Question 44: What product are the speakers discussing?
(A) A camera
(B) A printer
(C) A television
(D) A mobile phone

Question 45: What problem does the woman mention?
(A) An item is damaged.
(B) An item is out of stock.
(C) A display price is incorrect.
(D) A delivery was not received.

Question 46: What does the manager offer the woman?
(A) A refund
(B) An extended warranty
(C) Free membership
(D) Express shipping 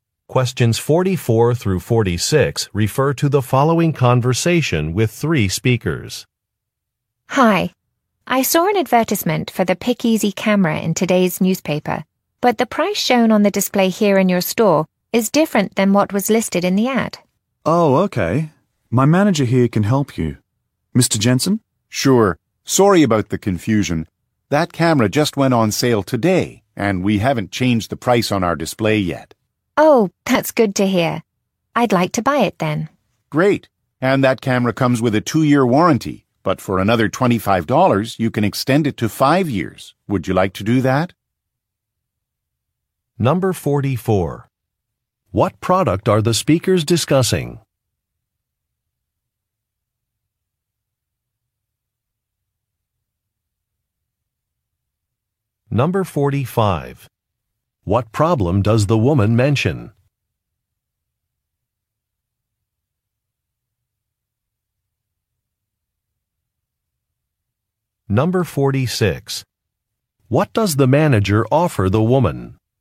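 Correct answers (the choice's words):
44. A camera
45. A display price is incorrect.
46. An extended warranty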